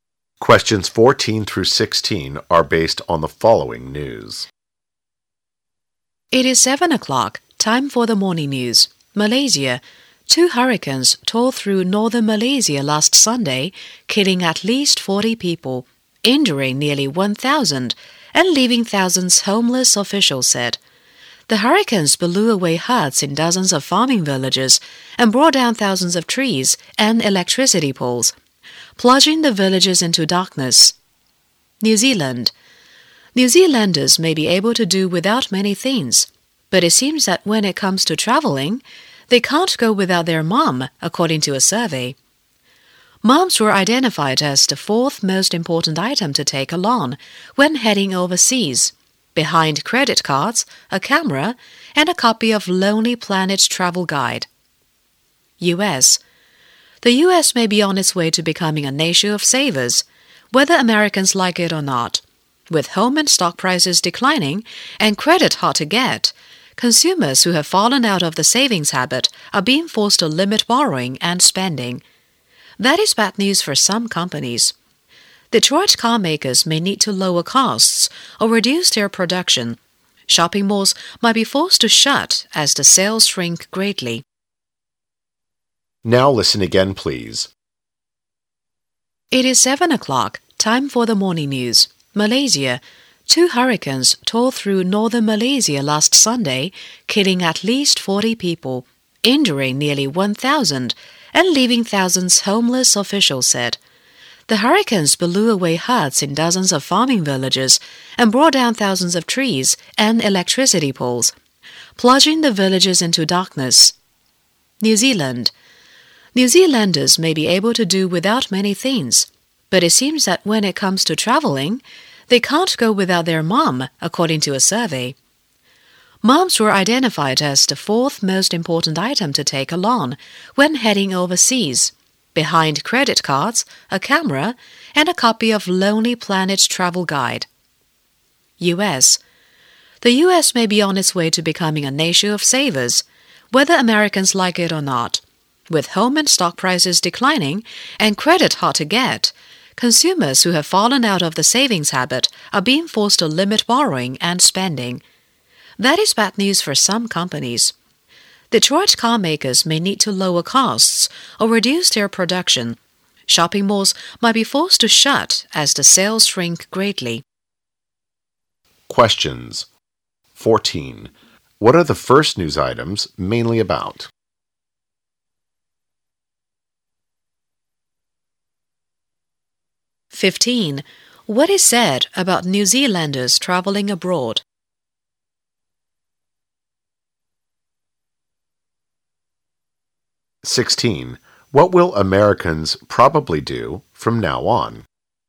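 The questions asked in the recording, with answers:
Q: What are the first news items mainly about?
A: Two hurricanes in northern Malaysia

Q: What is said about New Zealanders traveling abroad?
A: They can't go without their mothers

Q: What will Americans probably do from now on?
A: Save more and limit borrowing and spending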